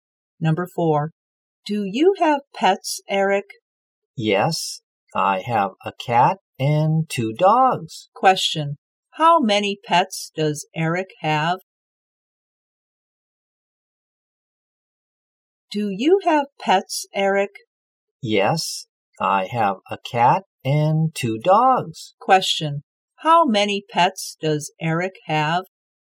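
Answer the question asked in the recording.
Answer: Three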